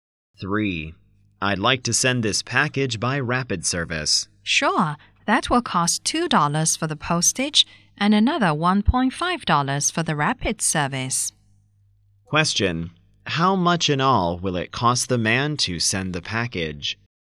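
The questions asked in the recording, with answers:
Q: How much in all will it cost the man to send the package?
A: $3.50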